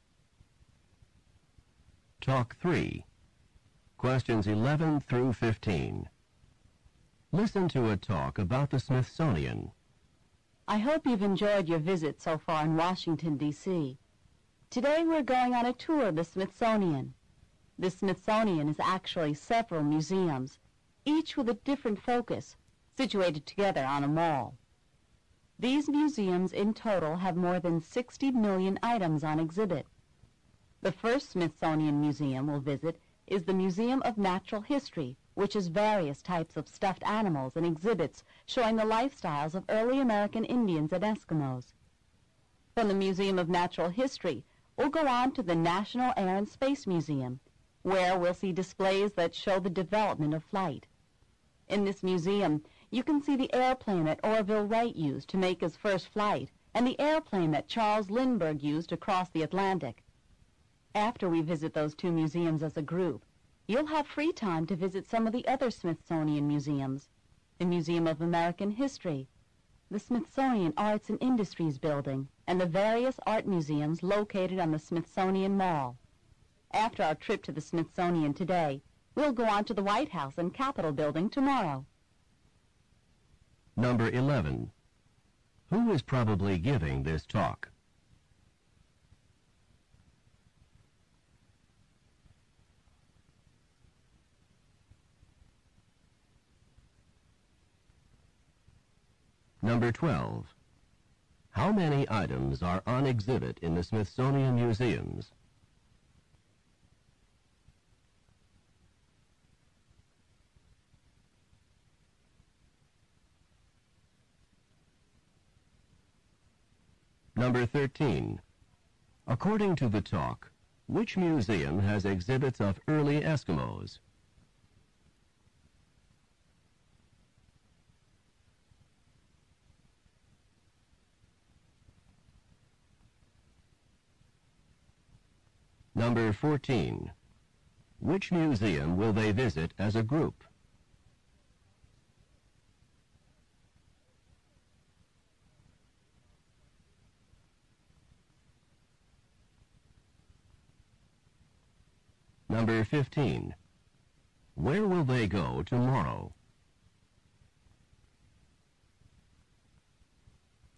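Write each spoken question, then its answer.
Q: Who is probably giving this talk?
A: A tour guide

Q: How many items are on exhibit in the Smithsonian Museums?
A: More than 60 million

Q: According to the talk, which museum has exhibits of early Eskimos?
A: The Museum of Natural History

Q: Which museum will they visit as a group?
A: The Museum of Natural History and the National Air and Space Museum

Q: Where will they go tomorrow?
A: To the White House and the Capitol Building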